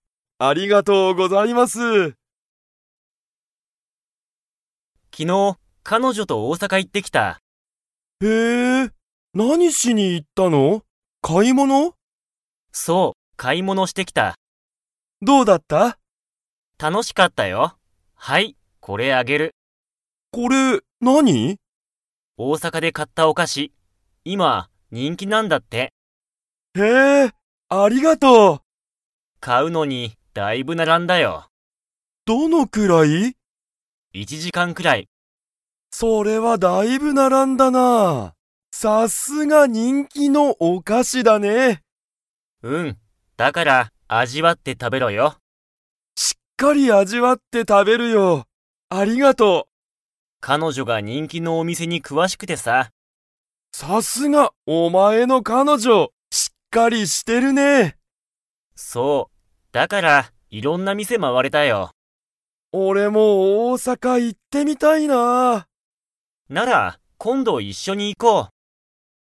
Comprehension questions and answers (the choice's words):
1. ハジメは、大阪おおさかに何なにしに行いきましたか?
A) 食事しょくじ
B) 仕事しごと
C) 勉強べんきょう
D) 買かい物もの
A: 買かい物もの

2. ユタカは大阪おおさかに 。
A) 行いってみたい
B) 行いってみたくない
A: 行いってみたい

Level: Level 4